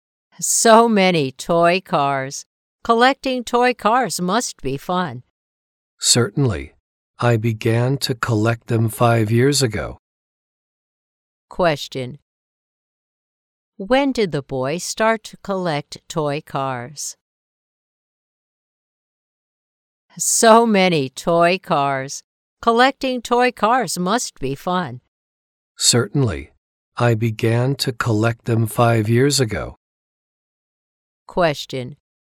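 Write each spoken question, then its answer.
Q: When did the boy start to collect toy cars?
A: 5 years ago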